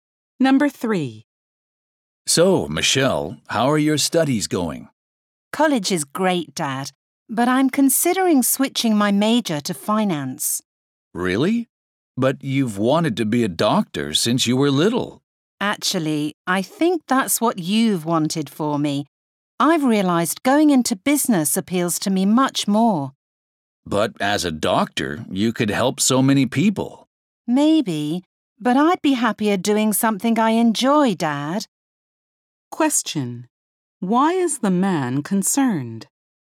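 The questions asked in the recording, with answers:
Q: Why is the man concerned?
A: His daughter wants to change her major from medicine to finance.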